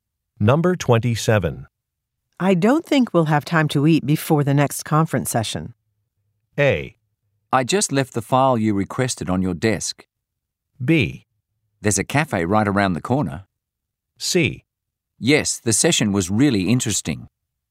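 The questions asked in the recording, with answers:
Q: I don't think we'll have time to eat before the next conference session.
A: B: There's a cafe right around the corner.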